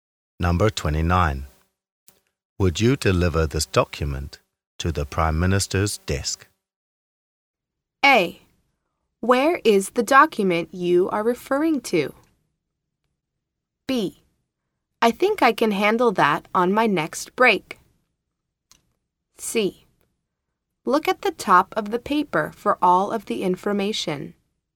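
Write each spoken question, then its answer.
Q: Would you deliver this document to the Prime Minister's desk?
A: B: I think I can handle that on my next break.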